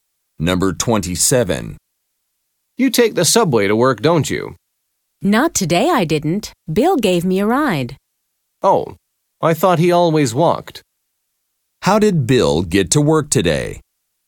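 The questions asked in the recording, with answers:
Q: How did Bill get to work today?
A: He drove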